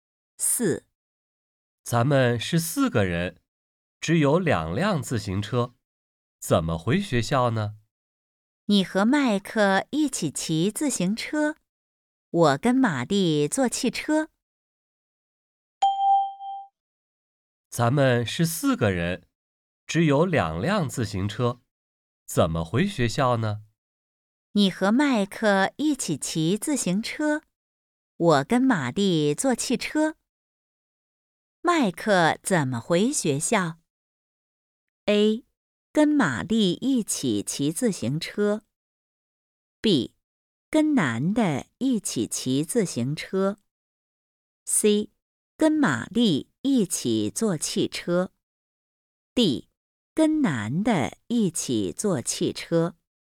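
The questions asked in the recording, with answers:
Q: 麦克怎么回学校?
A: B: 跟男的一起骑自行车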